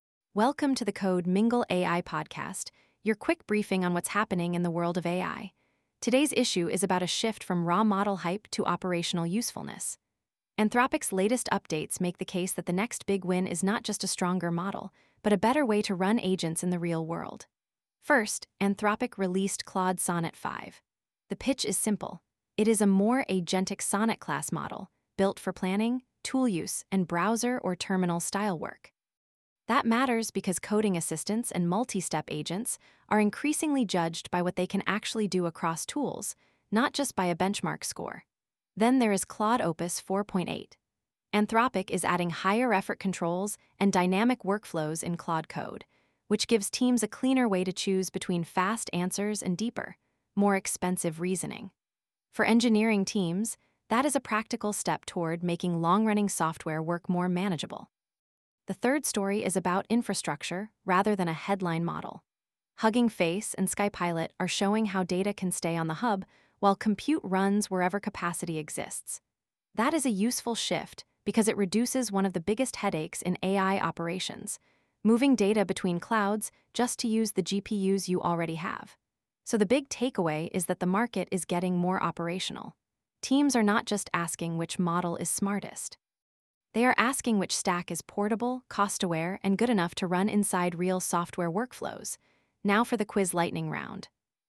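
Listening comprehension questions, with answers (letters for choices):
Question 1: What is the main practical reason Anthropic's Claude Sonnet 5 matters to developers?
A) It only works in the browser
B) It is positioned as a stronger, more agentic Sonnet-class model for coding and tool use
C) It removes the need for any evaluation or testing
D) It replaces all cloud infrastructure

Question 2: What is the key new capability Anthropic introduced with Opus 4.8?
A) A built-in local-only deployment mode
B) Higher-effort controls and dynamic workflows in Claude Code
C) A free open-weight model release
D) Automatic cloud cost abolition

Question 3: Why is Hugging Face's zero-egress storage story important for operators?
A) It makes every workload run only on a single cloud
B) It reduces the cost and friction of moving data between clouds for training and inference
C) It eliminates the need for GPUs entirely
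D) It replaces model weights with raw text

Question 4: What does the Anthropic release pattern suggest about the current AI market?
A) Benchmarks have become irrelevant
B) Model providers are bundling runtime controls and workflow support into the user experience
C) Every new release is only for consumer chat apps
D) Open-source models have become less important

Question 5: What should engineering teams prioritize after seeing these announcements?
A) Rewriting every workflow around a single vendor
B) Designing agent systems with fallback routes, cost awareness, and portability in mind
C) Ignoring data locality until production scale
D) Avoiding any automation until models become perfect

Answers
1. B
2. B
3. B
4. B
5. B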